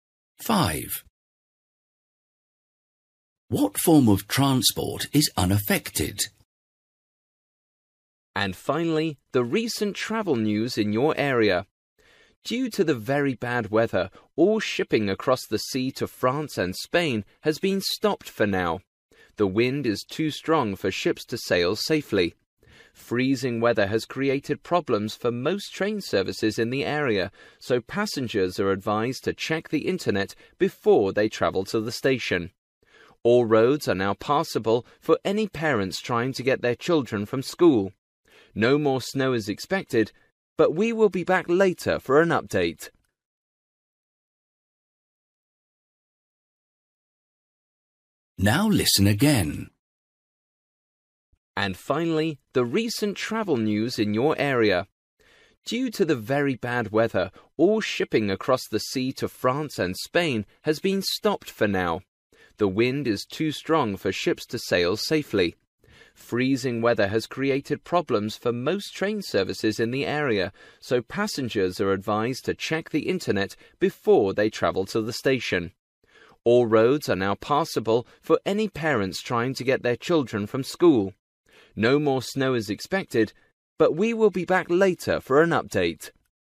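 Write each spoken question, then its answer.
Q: What form of transport is unaffected?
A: Road transport (cars)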